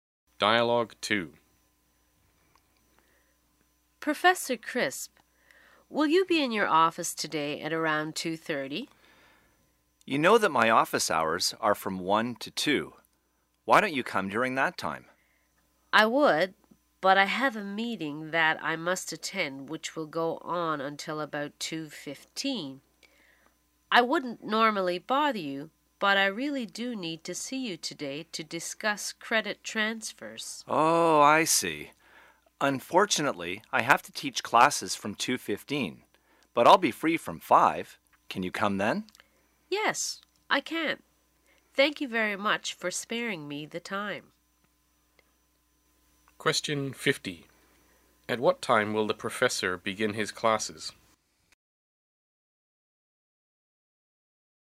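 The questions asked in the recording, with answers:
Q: At what time will the professor begin his classes?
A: At 2:15.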